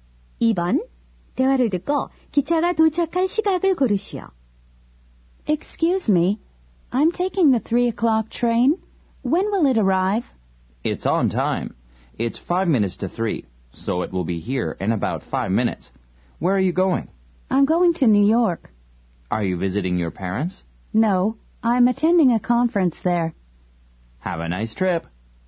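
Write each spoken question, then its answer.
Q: 대화를 듣고 기차가 도착할 시각을 고르시오.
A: 3시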